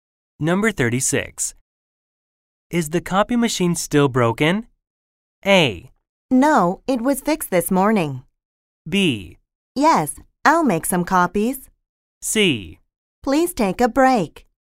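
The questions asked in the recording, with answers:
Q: Is the copy machine still broken?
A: A: No, it was fixed this morning.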